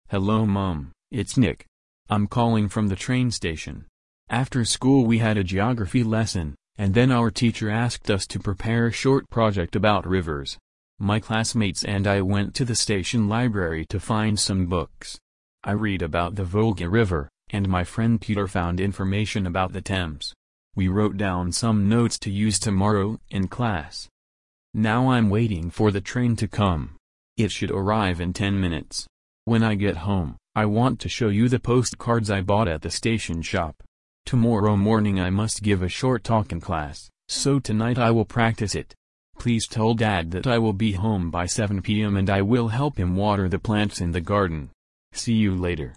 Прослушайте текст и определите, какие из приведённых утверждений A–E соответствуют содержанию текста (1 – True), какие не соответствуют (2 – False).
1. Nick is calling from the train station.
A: True

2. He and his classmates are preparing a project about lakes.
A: False

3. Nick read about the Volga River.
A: True

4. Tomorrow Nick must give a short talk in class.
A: True

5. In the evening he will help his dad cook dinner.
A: False

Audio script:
I'm calling from the train station. After school we had a Geography lesson, and then our teacher asked us to prepare a short project about rivers. My classmates and I went to the station library to find some books. I read about the Volga River, and my friend Peter found information about the Thames. We wrote down some notes to use tomorrow in class.
Now I'm waiting for the train to come. It should arrive in ten minutes. When I get home, I want to show you the postcards I bought at the station shop. Tomorrow morning I must give a short talk in class, so tonight I will practise it. Please tell Dad that I will be home by 7 p.m. and I will help him water the plants in the garden. See you later!

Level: 5 класс